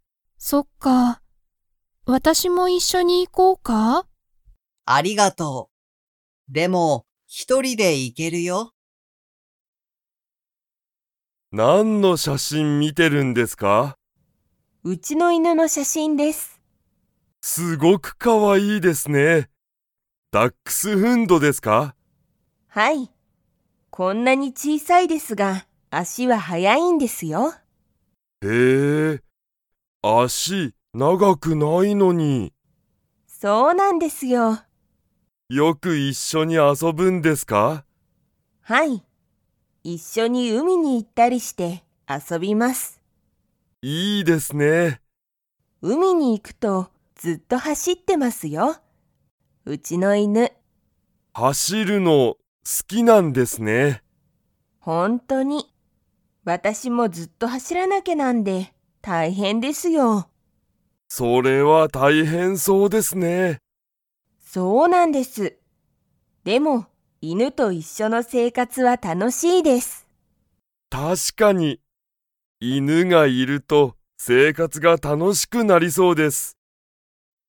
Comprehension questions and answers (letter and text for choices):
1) 渡辺(わたなべ)さんの犬(いぬ)は、足(あし)が速(はや)いですか?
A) はい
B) いいえ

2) 渡辺(わたなべ)さんの犬(いぬ)は、海(うみ)に行(い)くと____。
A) 写真(しゃしん)を撮(と)ってる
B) あまり遊(あそ)びたくない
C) ずっと走はしっている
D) 渡辺(わたなべ)さんが好(す)きだ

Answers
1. A) はい
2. C) ずっと走はしっている

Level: Level 2